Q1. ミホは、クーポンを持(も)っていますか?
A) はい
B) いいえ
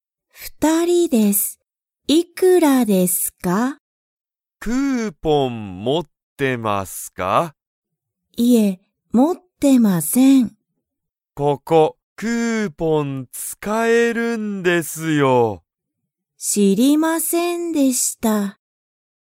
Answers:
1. B

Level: Level 1

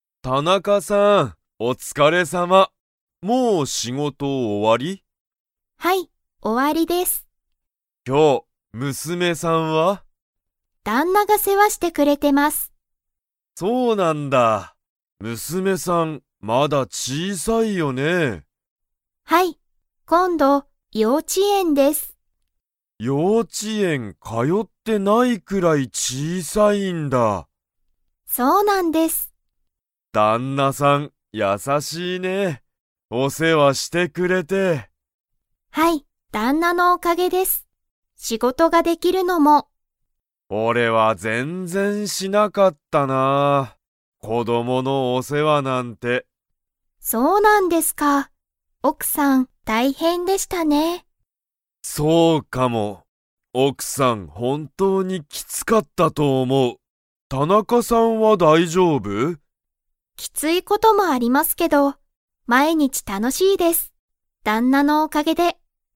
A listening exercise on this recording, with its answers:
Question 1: 今日きょう、誰だれが田中たなかさんの娘むすめを世話せわしていますか?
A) 幼稚ようち園えん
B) 田中たなかさんの旦那だんな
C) 佐藤さとうさん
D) 佐藤さとうさんの奥おくさん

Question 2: 佐藤さとうさんは、子供こどものお世話せわを 。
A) した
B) しなかった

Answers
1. B
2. B

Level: Level 4

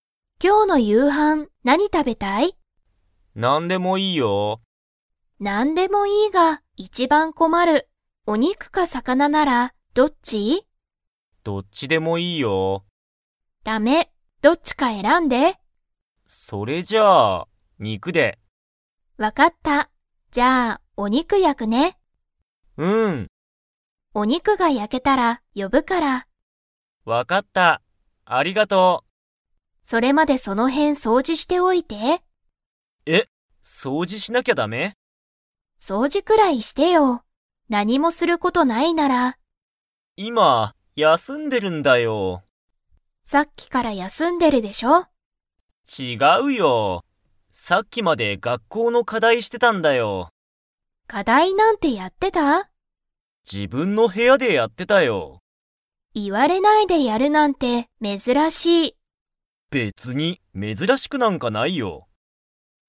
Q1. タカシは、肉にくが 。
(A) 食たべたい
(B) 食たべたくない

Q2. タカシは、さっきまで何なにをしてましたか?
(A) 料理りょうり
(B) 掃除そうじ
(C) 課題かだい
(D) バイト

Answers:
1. A
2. C

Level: Level 4

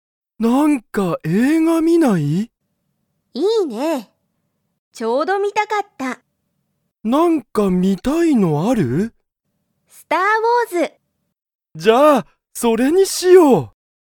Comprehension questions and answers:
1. ユウヤとサキは、映画えいがを観みますか?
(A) はい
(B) いいえ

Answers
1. A

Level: Level 1

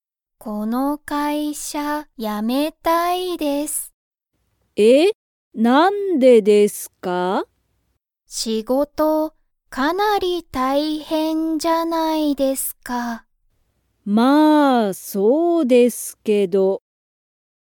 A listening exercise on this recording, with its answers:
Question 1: 松本(まつもと)さんの仕事(しごと)は、____。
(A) たくさんだ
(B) おいしい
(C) 大変たいへんだ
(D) すごい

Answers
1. C

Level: Level 1

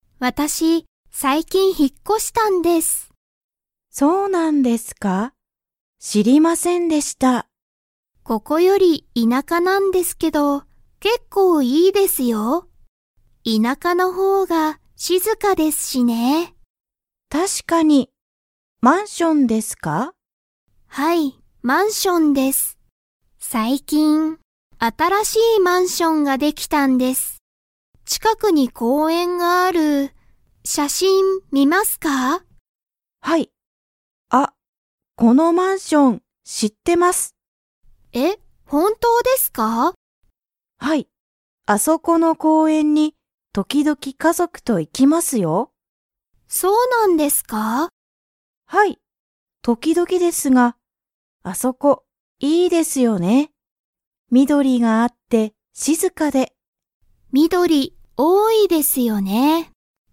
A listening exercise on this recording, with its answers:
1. 田中たなかさんが引ひっ越こしたマンションの近ちかくには、何なにがありますか?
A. 公園こうえん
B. 会社かいしゃ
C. 家族かぞく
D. 田舎いなか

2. 公園こうえんは、緑みどりが 。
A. 少すくない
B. 多おおい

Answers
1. A
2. B

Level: Level 4

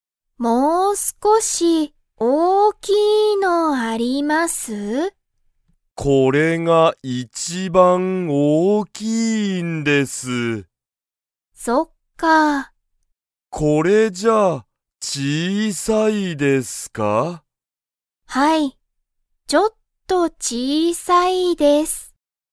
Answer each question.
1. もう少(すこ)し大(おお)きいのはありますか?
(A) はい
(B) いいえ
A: B

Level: Level 1

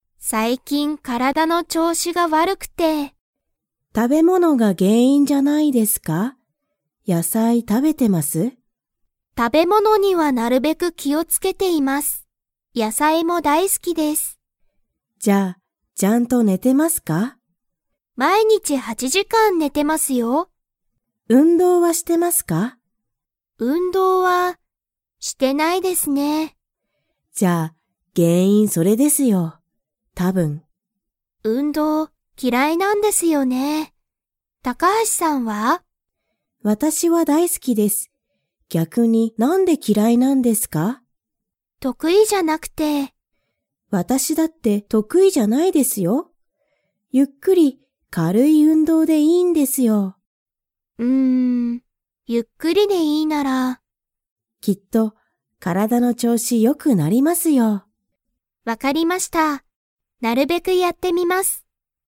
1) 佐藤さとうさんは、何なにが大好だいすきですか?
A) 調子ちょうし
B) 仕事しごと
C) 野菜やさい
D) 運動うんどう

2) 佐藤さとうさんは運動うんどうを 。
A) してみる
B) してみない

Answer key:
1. C
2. A

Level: Level 4

